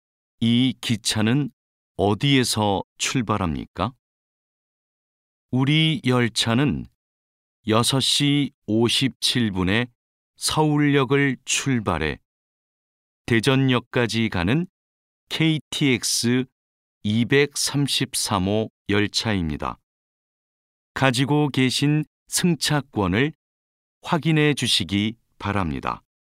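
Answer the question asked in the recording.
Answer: 서울역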